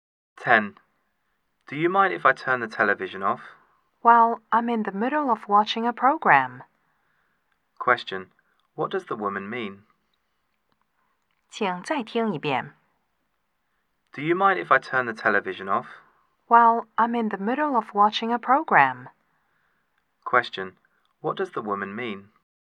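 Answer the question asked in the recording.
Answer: She doesn't want the TV turned off.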